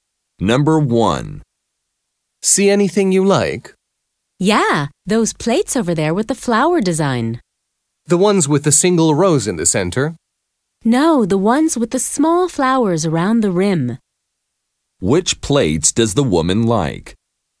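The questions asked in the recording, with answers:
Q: Which plates does the woman like?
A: The ones with small flowers around the rim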